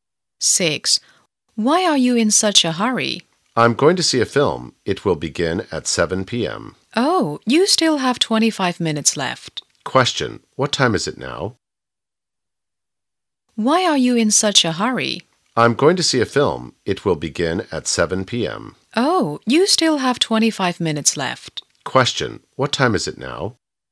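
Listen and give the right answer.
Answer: 6:35 p.m.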